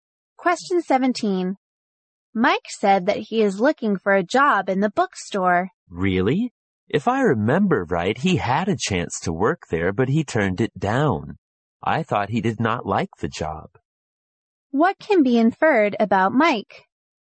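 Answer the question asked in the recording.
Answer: He was offered a job at the bookstore but turned it down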